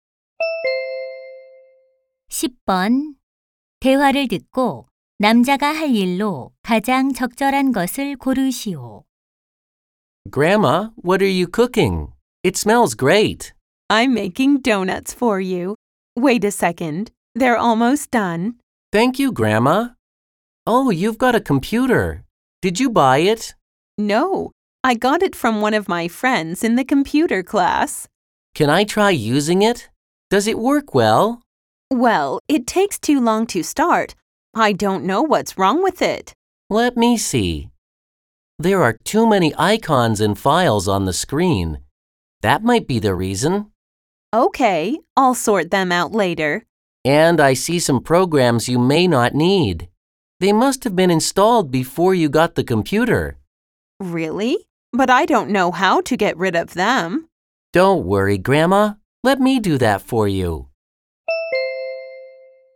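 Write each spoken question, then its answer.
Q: 대화를 듣고 남자가 할 일로 가장 적절한 것을 고르시오.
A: 할머니 컴퓨터의 불필요한 프로그램 삭제하기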